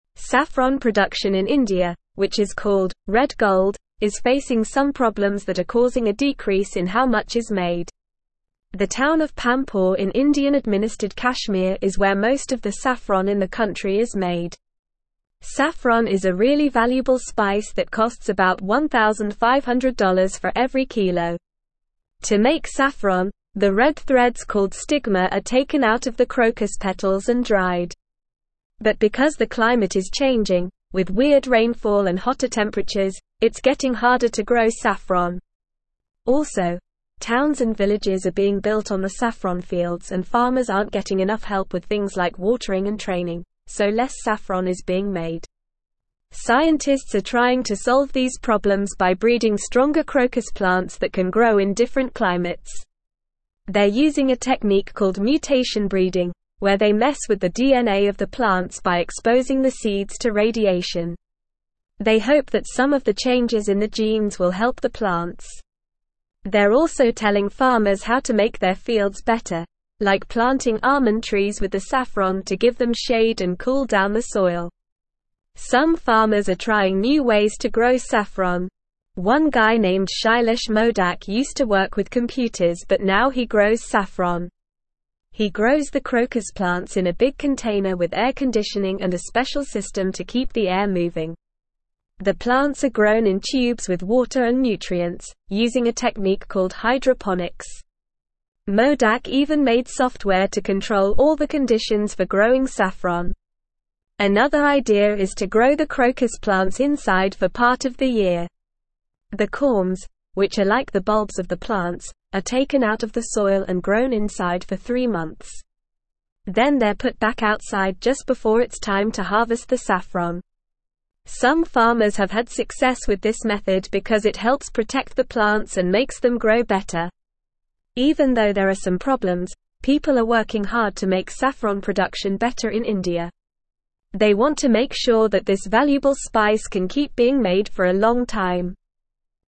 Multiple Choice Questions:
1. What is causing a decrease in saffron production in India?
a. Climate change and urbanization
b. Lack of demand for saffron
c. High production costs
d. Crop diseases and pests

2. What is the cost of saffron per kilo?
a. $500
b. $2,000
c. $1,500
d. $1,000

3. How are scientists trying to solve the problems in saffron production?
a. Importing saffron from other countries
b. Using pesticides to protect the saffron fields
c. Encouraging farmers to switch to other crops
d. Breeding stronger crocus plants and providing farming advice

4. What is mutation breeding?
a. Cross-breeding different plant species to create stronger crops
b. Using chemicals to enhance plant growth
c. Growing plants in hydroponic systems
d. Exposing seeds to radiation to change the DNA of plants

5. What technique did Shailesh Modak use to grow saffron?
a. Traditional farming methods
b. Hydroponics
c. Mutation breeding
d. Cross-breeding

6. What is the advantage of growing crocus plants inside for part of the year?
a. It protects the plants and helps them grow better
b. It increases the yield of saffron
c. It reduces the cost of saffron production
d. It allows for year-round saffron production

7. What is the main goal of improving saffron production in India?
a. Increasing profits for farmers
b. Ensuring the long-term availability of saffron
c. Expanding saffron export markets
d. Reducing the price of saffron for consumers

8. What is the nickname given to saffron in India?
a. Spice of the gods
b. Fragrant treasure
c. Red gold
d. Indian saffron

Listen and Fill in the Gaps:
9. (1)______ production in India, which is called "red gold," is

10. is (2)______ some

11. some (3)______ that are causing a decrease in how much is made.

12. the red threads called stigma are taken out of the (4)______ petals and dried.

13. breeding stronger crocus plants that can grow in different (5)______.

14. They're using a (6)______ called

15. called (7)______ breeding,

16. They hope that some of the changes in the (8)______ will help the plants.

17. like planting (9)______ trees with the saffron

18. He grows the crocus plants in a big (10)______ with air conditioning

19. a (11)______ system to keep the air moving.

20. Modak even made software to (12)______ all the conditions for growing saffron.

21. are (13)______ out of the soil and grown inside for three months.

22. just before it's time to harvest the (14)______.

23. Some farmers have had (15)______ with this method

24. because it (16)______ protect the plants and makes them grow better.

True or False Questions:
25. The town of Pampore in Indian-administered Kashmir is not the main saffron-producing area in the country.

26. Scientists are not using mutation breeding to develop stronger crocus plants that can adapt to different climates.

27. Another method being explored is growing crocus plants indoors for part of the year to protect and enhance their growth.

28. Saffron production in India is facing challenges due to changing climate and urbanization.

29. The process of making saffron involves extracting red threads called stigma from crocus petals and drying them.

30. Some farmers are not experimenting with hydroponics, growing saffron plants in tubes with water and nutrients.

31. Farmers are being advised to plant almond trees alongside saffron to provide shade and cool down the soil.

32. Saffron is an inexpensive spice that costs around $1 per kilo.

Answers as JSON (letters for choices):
{"1": "a", "2": "c", "3": "d", "4": "d", "5": "b", "6": "a", "7": "b", "8": "c", "9": "Saffron", "10": "facing", "11": "problems", "12": "crocus", "13": "climates", "14": "technique", "15": "mutation", "16": "genes", "17": "almond", "18": "container", "19": "special", "20": "control", "21": "taken", "22": "saffron", "23": "success", "24": "helps", "25": "False", "26": "False", "27": "True", "28": "True", "29": "True", "30": "False", "31": "True", "32": "False"}

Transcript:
Saffron production in India, which is called "red gold," is facing some problems that are causing a decrease in how much is made. The town of Pampore in Indian-administered Kashmir is where most of the saffron in the country is made. Saffron is a really valuable spice that costs about $1,500 for every kilo. To make saffron, the red threads called stigma are taken out of the crocus petals and dried. But because the climate is changing, with weird rainfall and hotter temperatures, it's getting harder to grow saffron. Also, towns and villages are being built on the saffron fields and farmers aren't getting enough help with things like watering and training, so less saffron is being made.
Scientists are trying to solve these problems by breeding stronger crocus plants that can grow in different climates. They're using a technique called mutation breeding, where they mess with the DNA of the plants by exposing the seeds to radiation. They hope that some of the changes in the genes will help the plants. They're also telling farmers how to make their fields better, like planting almond trees with the saffron to give them shade and cool down the soil.
Some farmers are trying new ways to grow saffron. One guy named Shailesh Modak used to work with computers but now he grows saffron. He grows the crocus plants in a big container with air conditioning and a special system to keep the air moving. The plants are grown in tubes with water and nutrients, using a technique called hydroponics. Modak even made software to control all the conditions for growing saffron.
Another idea is to grow the crocus plants inside for part of the year. The corms, which are like the bulbs of the plants, are taken out of the soil and grown inside for three months. Then they're put back outside just before it's time to harvest the saffron. Some farmers have had success with this method because it helps protect the plants and makes them grow better.
Even though there are some problems, people are working hard to make saffron production better in India. They want to make sure that this valuable spice can keep being made for a long time.

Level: Level 3